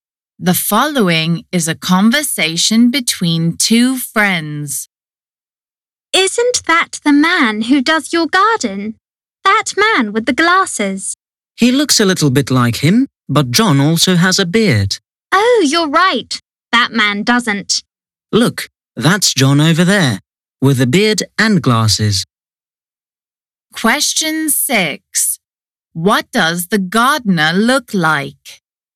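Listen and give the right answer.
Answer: he has a beard and glasses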